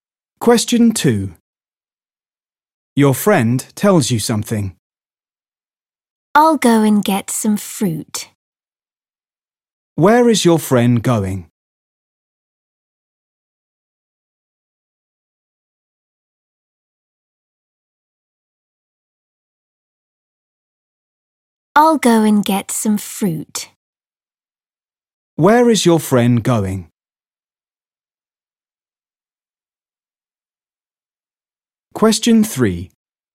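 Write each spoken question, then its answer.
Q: Where is your friend going?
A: to get some fruit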